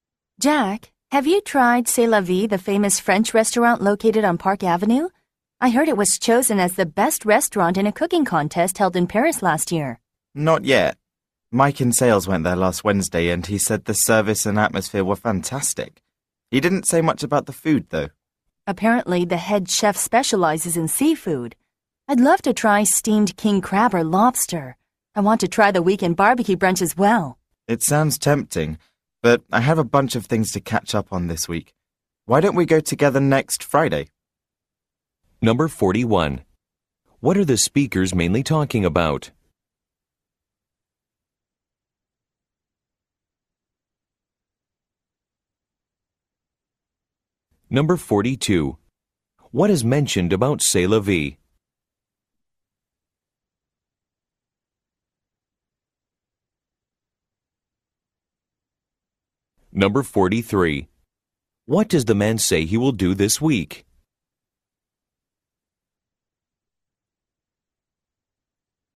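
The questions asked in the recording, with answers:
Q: What are the speakers mainly talking about?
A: A French restaurant, C'est la Vie

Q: What is mentioned about C'est la vie?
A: It was chosen as the best restaurant in a cooking contest in Paris last year

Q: What does the man say he will do this week?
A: Catch up on a bunch of things (work)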